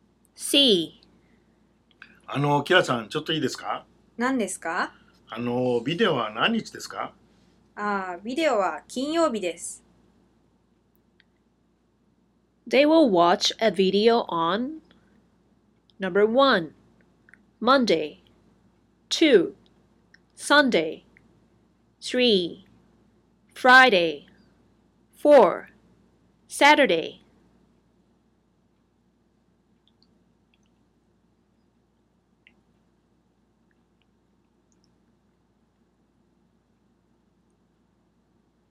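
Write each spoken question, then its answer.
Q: They will watch a video on Number 1 Monday 2 Sunday 3 Friday 4 Saturday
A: 3: Friday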